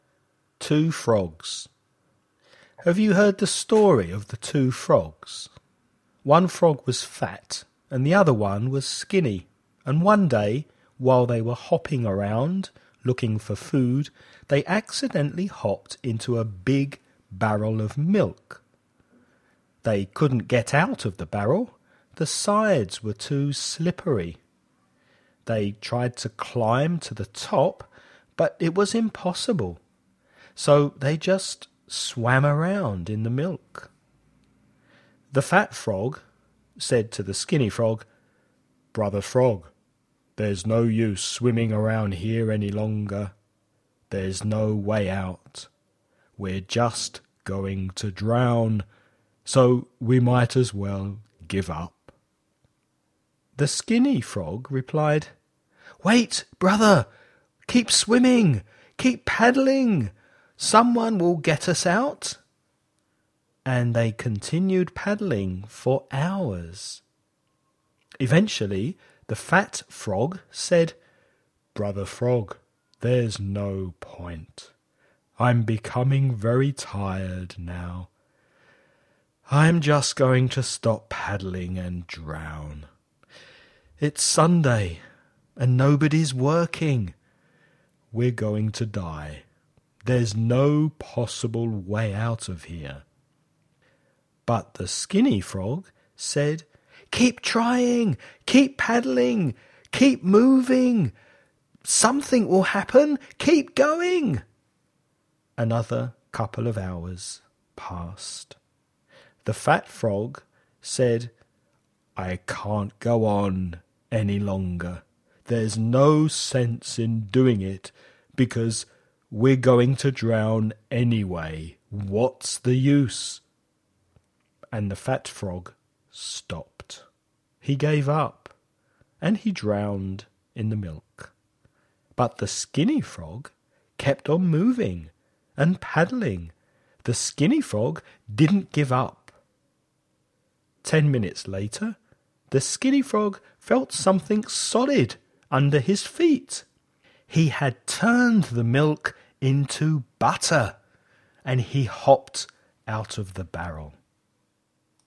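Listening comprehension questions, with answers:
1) What were the frogs looking for before they fell into the barrel?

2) What did they frogs do when they realized they couldn't get out of the barrel of milk?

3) Which day of the week was it?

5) What did the milk change into?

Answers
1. Food
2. They swam around in the milk
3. Sunday
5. Butter

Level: nivel Intermedio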